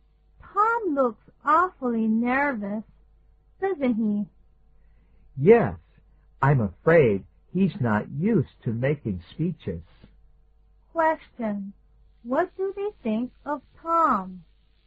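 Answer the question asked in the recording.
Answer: He looks nervous because he isn't used to making speeches.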